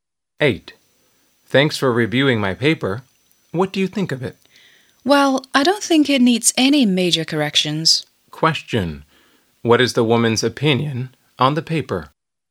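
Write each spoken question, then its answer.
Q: What is the woman's opinion on the paper?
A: It is good and needs only minor changes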